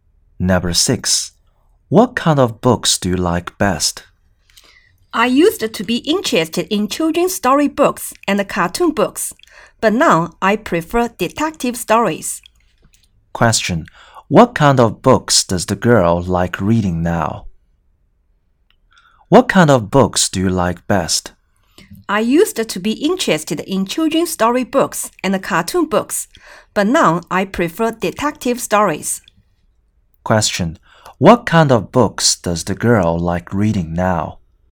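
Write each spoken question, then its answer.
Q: What kind of books does the girl like reading now?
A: Detective stories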